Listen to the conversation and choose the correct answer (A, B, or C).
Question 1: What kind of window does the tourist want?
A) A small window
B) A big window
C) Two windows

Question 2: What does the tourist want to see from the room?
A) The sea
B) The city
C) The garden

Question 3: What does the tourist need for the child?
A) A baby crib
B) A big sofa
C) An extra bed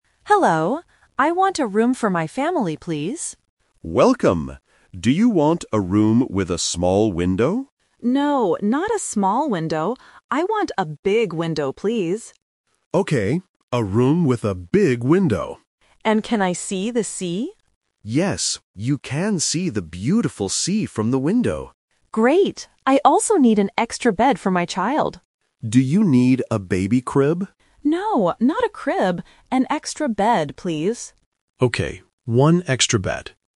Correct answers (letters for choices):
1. B
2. A
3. C

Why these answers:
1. The tourist explicitly says, "No, not a small window. I want a big window, please." Option (A) is the trap because the receptionist asks about a "small window", but the tourist says "No". Option (C) is a plausible number but is not mentioned.
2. The tourist asks, "And can I see the sea?". The receptionist confirms this. Options (B) and (C) are plausible things to see from a hotel room, but they are never mentioned in the audio.
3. The tourist says, "I also need an extra bed for my child." Option (A) is the trap because the receptionist offers a "baby crib," but the tourist rejects it ("No, not a crib"). Option (B) is not mentioned.

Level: A1